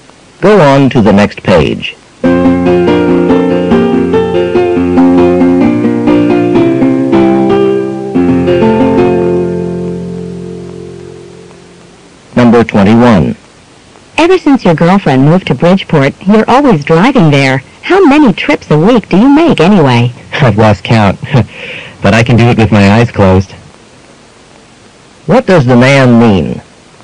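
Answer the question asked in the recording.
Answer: He drives there so often he knows the way very well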